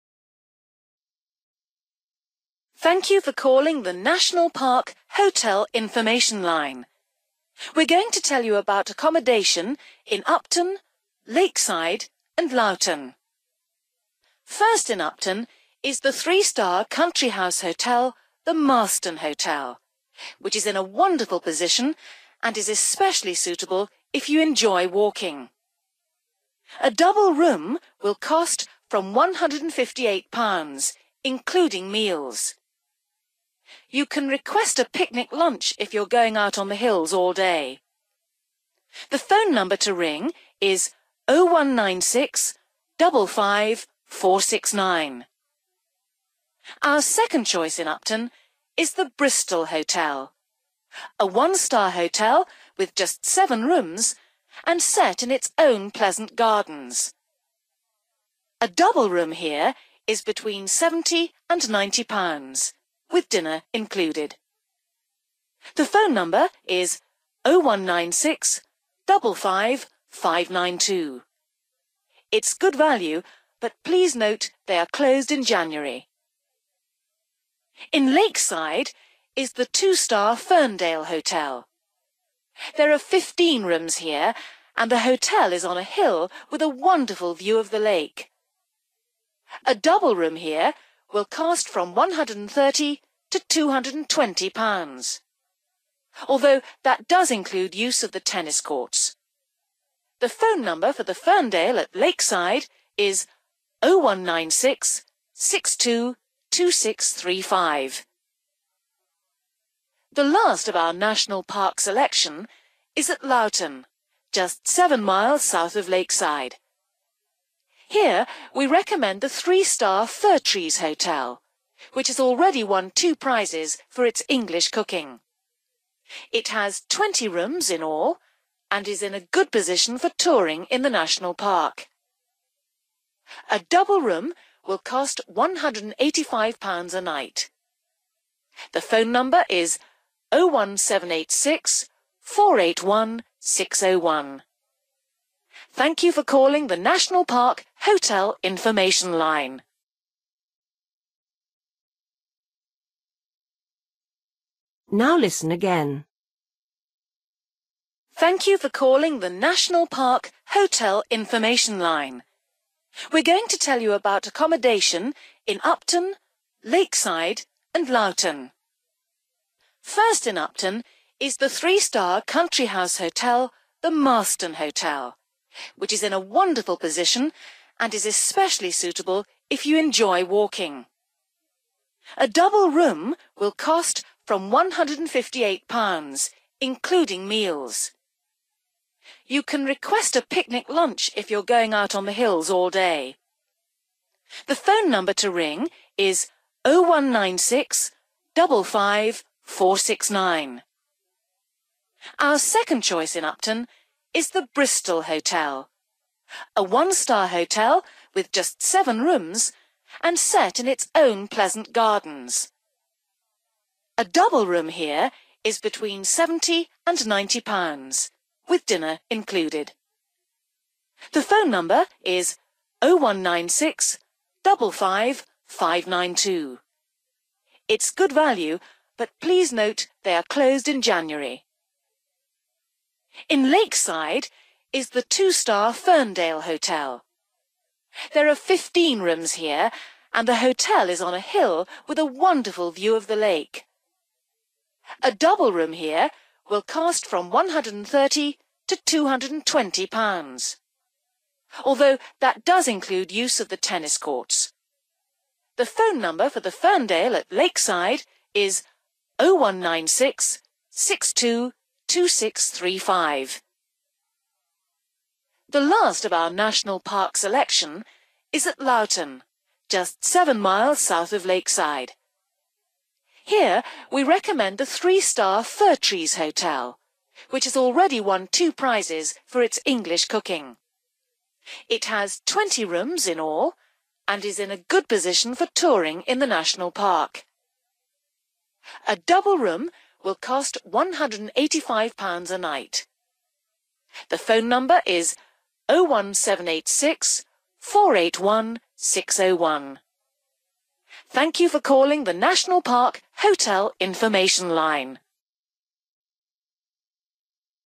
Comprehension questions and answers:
For each question, fill in the missing information in the numbered space.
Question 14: Good for people who like (14) ........................... .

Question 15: If you ask, the hotel will make you a (15) ........................... .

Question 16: Price includes (16) ........................... .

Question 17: Good view of (17) ........................... .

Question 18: Has won prizes for its (18) ........................... .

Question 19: Price of a double room (19) £ ........................... a night.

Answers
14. walking/(to) walk/walks
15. picnic/lunch / picnic lunch
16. dinner(s)
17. (the) lake(side)
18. (English) cooking/food
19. (£)185

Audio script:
Woman: Thank you for calling the National Park Hotel Information Line. We're going to tell you about accommodation in Upton, Lakeside and Lowton. First, in Upton, is the three-star country house hotel, the Marston Hotel, which is in a wonderful position and is especially suitable if you enjoy walking. A double room will cost from £158, including meals. You can request a picnic lunch if you're going out on the hills all day. The phone number to ring is 019655 469.
Our second choice in Upton is the Bristol Hotel, a one-star hotel with just seven rooms and set in its own pleasant gardens. A double room here is between £70 and £90, with dinner included. It's good value, but please note they are closed in January.
In Lakeside is the two-star Ferndale Hotel. There are 15 rooms here and the hotel is on a hill with a wonderful view of the lake. A double room here will cost from £130 to £220, although that does include use of the tennis courts. The phone number for the Ferndale at Lakeside is 019662 2635.
The last of our National Park selection is at Lowton, just seven miles south of Lakeside. Here we recommend the three-star Firtrees Hotel, which has already won two prizes for its English cooking. It has 20 rooms in all and is in a good position for touring in the National Park.

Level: B1